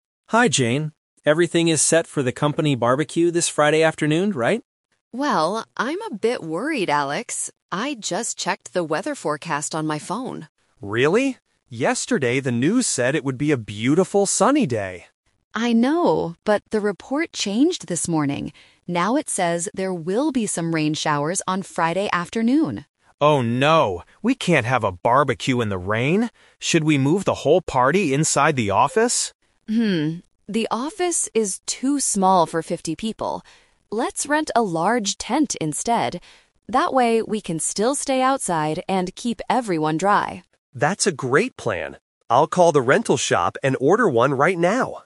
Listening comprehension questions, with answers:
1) What did the weather forecast say yesterday?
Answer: It would be sunny.

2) Why are the speakers worried?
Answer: Because it might rain during the BBQ.

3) What is their final decision for the party?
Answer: They will rent a large tent for the BBQ.

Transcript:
Alex: Hi Jane. Everything is set for the company BBQ this Friday afternoon, right?
Jane: Well, I'm a bit worried, Alex. I just checked the weather forecast on my phone.
Alex: Really? Yesterday the news said it would be a beautiful sunny day.
Jane: I know, but the report changed this morning. Now it says there will be some rain showers on Friday afternoon.
Alex: Oh no! We can't have a BBQ in the rain. Should we move the whole party inside the office?
Jane: Hmm, the office is too small for fifty people. Let's rent a large tent instead. That way, we can still stay outside and keep everyone dry.